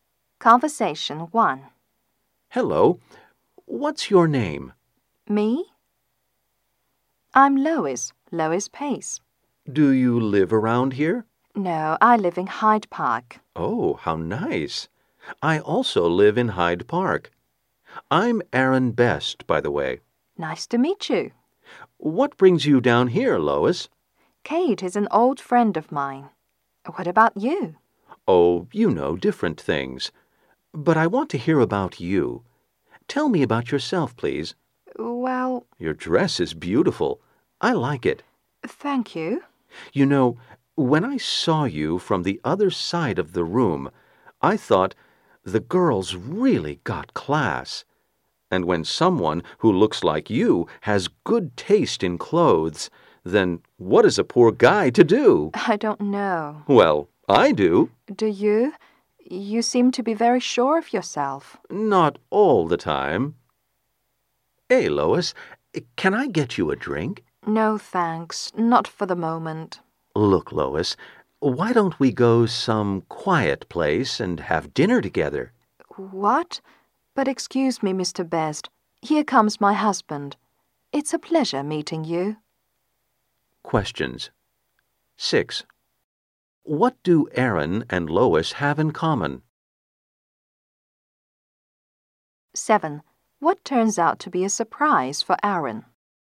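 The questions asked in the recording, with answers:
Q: What do Aaron and Lois have in common?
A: They both live in Hyde Park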